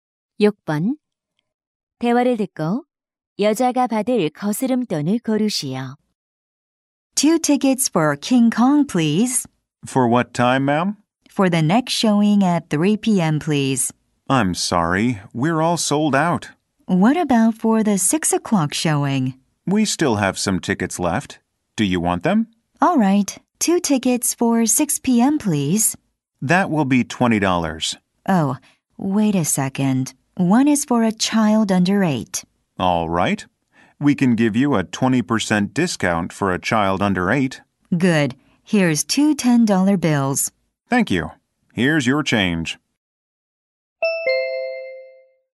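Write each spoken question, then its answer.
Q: 대화를 듣고 여자가 받을 거스름돈을 고르시오.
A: 2달러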